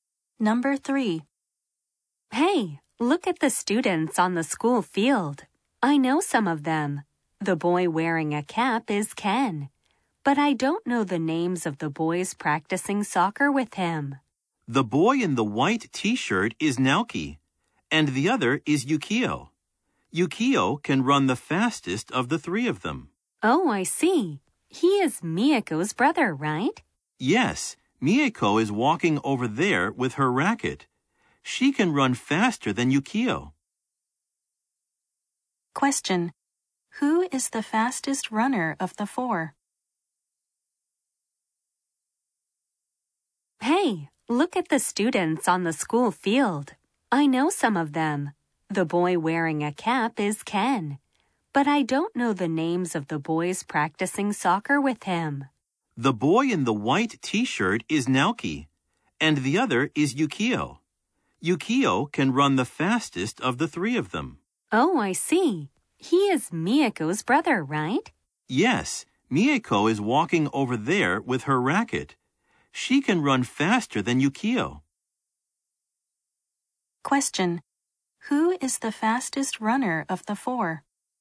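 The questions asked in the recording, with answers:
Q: Who is the fastest runner of the 4?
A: Miyako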